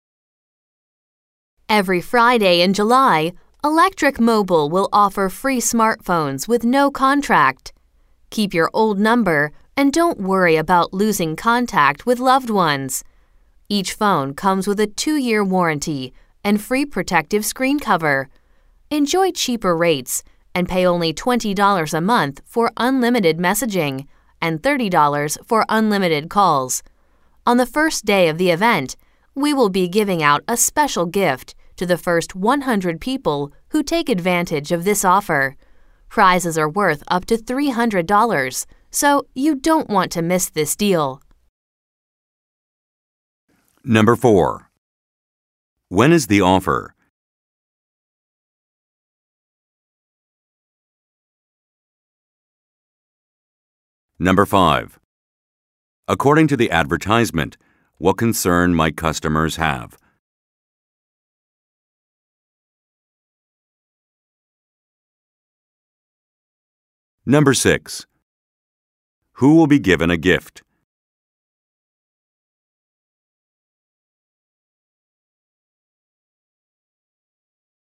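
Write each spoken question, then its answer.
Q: When is the offer?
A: Every Friday in July

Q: Who will be given a gift?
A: The first 100 people who take the offer on the first day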